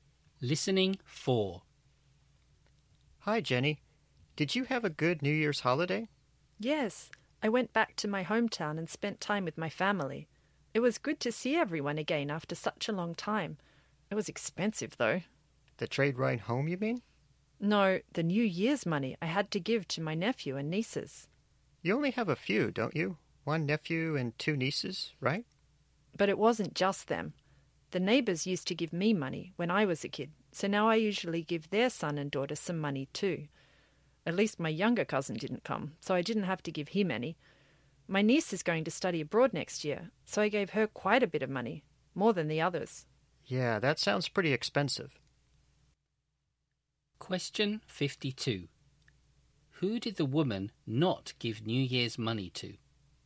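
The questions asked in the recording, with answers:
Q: Who did the woman not give New Year's money to?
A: Her younger cousin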